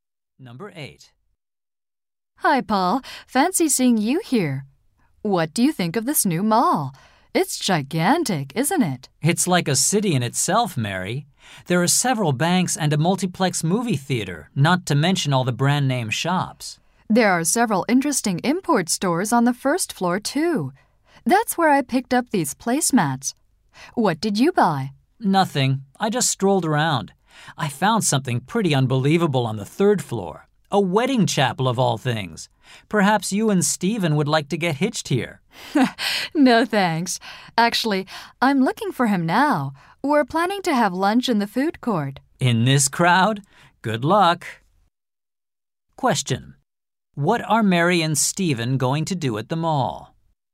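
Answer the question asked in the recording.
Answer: Have lunch in the food court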